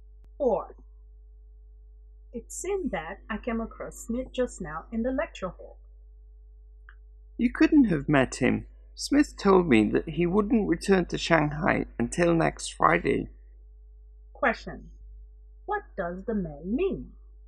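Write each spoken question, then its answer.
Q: what does the man mean?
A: The woman couldn't have seen Smith because he is not back in Shanghai until next Friday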